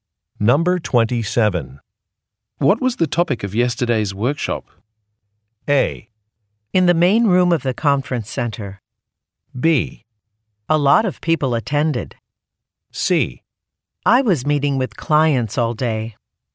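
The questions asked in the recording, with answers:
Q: What was the topic of yesterday's workshop?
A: C: I was meeting with clients all day.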